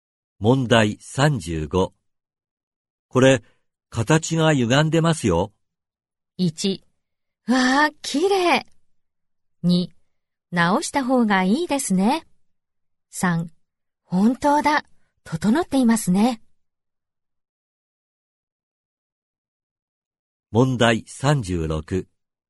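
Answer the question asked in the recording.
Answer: 2: 直した方がいいですね。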